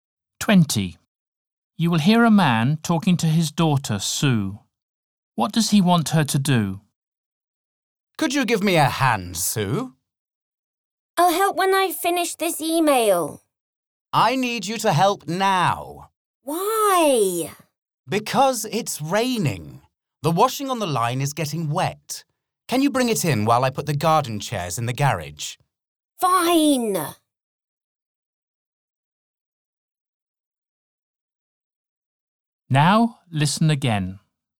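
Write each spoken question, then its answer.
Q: What does he want her to do?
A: Bring in the washing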